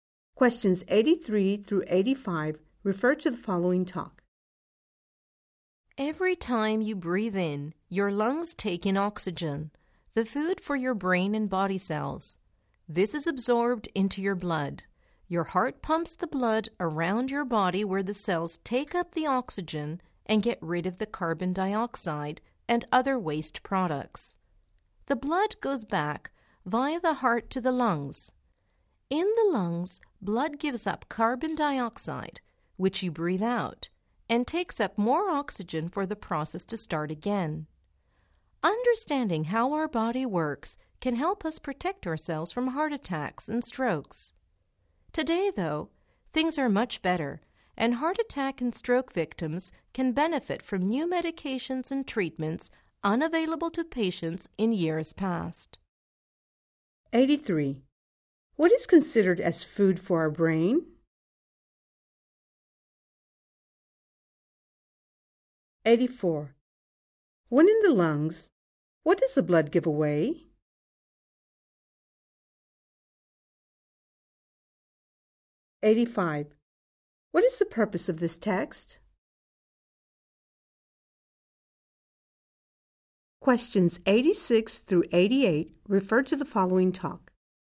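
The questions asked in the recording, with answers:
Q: What is considered as food for our brain?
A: Oxygen

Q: When in the lungs, what does the blood give away?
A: Carbon dioxide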